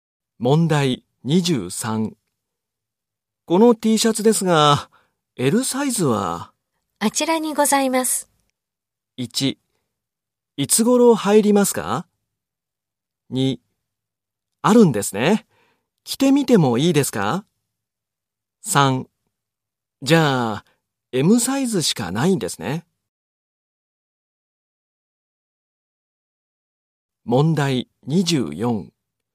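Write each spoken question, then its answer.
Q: この T シャツですが、L サイズは?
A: 2: あるんですね。着てみてもいいですか?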